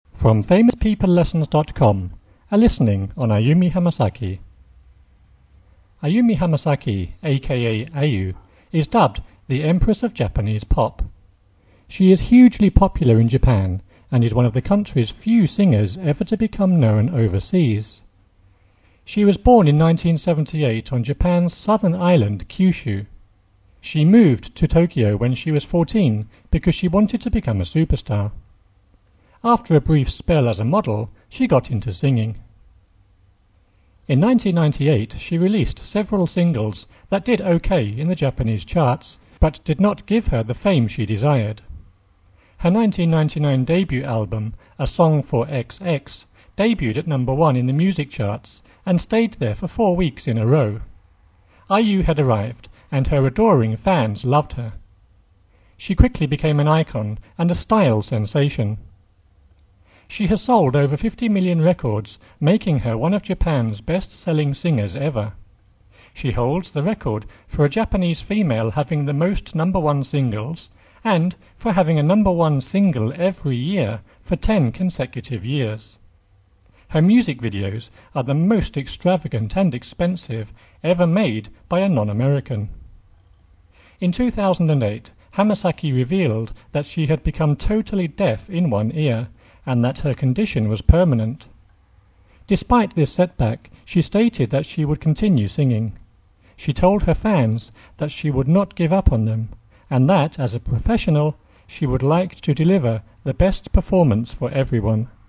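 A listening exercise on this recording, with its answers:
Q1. Ayumi Hamasaki, _____________, is dubbed "the Empress of Japanese Pop".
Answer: a.k.a. "Ayu"

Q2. She is _____________ in Japan and is one of the country's few singers _____________ known overseas.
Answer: hugely popular; ever to become

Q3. After _____________ a model, she got into singing.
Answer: a brief spell as

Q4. In 1998, she released several singles _____________ in the Japanese charts, but did not give her the fame _____________.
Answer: that did OK; she desired

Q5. Her 1999 debut album 'A Song for XX' debuted at number one in the music charts and stayed there for four _____________.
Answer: weeks in a row

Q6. She quickly became an icon and a _____________.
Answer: style sensation

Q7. She has sold over 50 million records, making _____________ Japan's best-selling singers ever.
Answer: her one of

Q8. She _________________ a Japanese female having the most number-one singles and for having a number-one single _____________ ten consecutive years.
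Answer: holds the record for; every year for

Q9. Her music videos are the most extravagant and expensive _____________ non-American.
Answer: ever made by a

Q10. In 2008, Hamasaki revealed that she had _________________ in one ear, and that her condition was permanent.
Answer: become totally deaf

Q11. Despite _______________ stated that she would continue singing.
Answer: this setback, she

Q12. She told her fans that she would "not give _____________, and that "as a professional", she would like _____________ best performance for everyone".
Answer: up" on them; to "deliver the

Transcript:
"Ayu", is dubbed "the Empress of Japanese Pop". She is hugely popular in Japan and is one of the country's few singers ever to become known overseas. She was born in 1978 on Japan's southern island Kyushu. She moved to Tokyo when she was 14 because she wanted to become a superstar. After a brief spell as a model, she got into singing.
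In 1998, she released several singles that did OK in the Japanese charts, but did not give her the fame she desired. Her 1999 debut album 'A Song for XX' debuted at number one in the music charts and stayed there for four weeks in a row. Ayu had arrived and her adoring fans loved her. She quickly became an icon and a style sensation.
She has sold over 50 million records, making her one of Japan's best-selling singers ever. She holds the record for a Japanese female having the most number-one singles and for having a number-one single every year for ten consecutive years.
She holding / holds the record for a Japanese female having the most number-one singles and for having a number-one single every year for / from ten consecutive years. Her music videos are the most extravagant and expensive / expense ever made by a non-American.
In 2008, Hamasaki revealed that she had become totally / total deaf in one ear, and that her condition was permanent. 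Despite this / these setback, she stated that she would continue songs / singing. She told her fans that she would "not give over / up" on them, and that "as a professional", she would like to "deliver the best performance for everyone".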